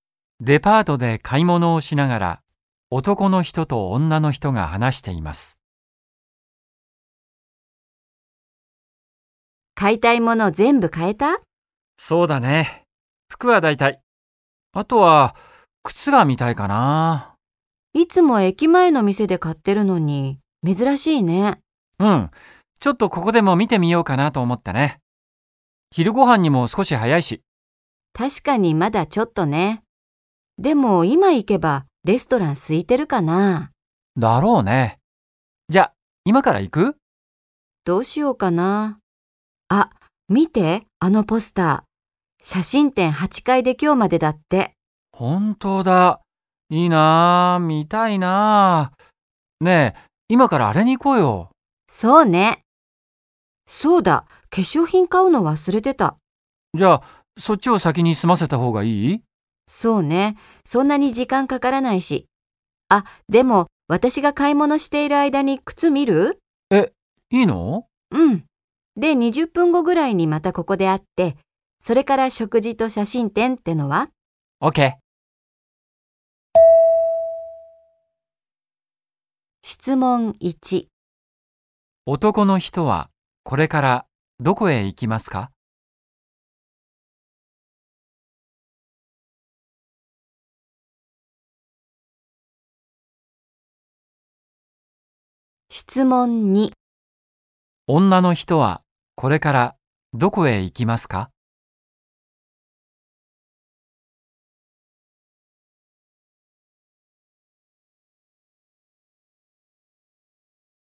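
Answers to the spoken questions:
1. 靴売り場
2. 化粧品売り場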